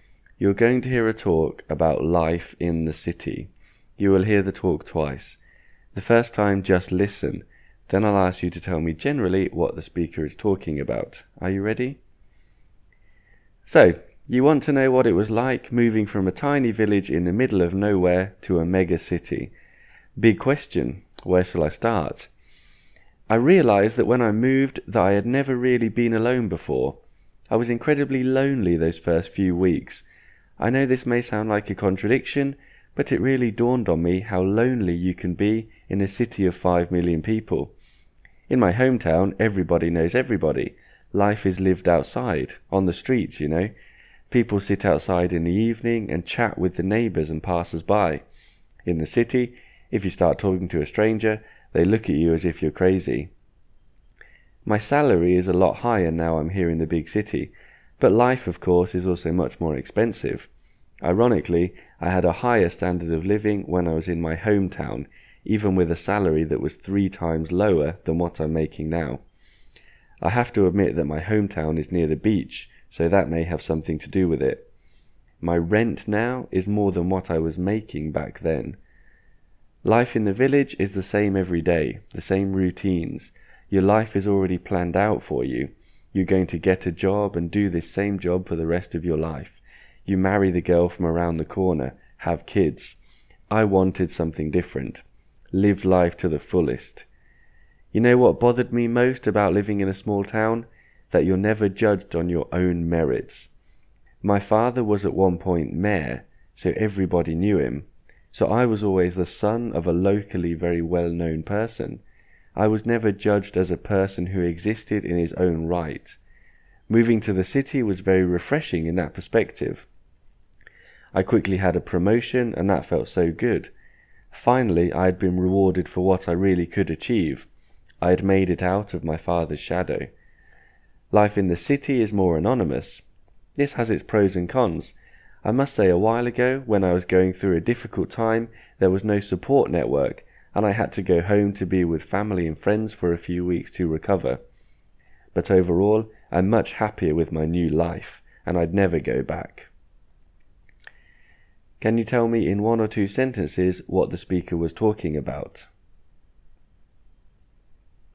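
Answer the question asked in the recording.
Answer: What it was like to move from a tiny village to a mega city, and the good and bad sides of life in each.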